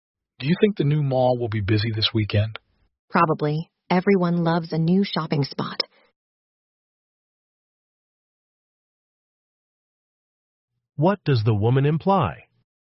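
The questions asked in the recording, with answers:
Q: What does the woman imply?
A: The new mall will probably be busy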